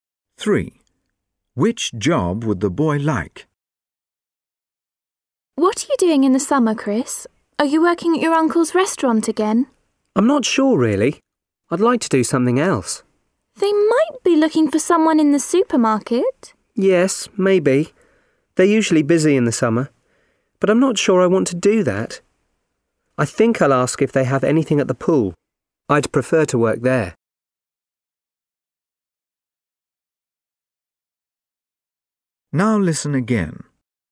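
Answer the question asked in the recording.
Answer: Working at the pool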